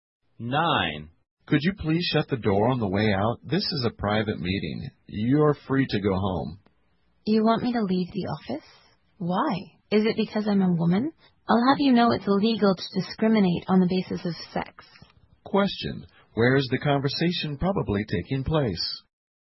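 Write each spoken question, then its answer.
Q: Where is the conversation probably taking place?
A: In an office.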